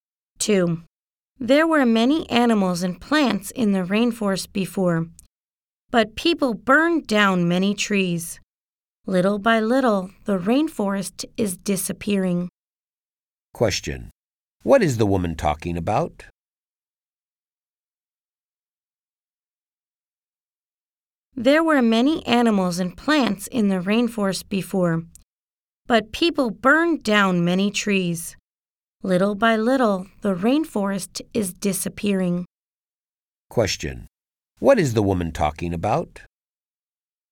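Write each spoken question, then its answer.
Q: What is the woman talking about?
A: The rainforest is disappearing.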